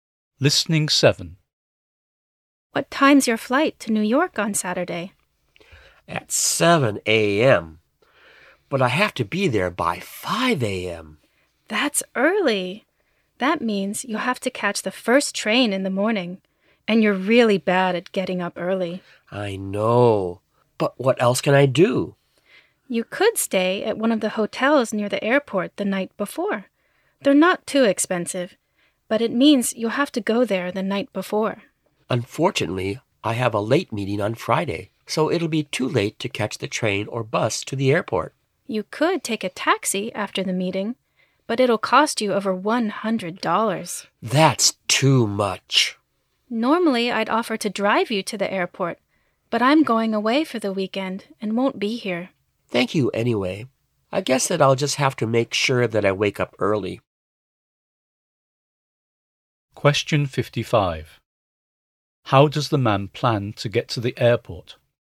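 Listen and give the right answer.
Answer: By catching the first train in the morning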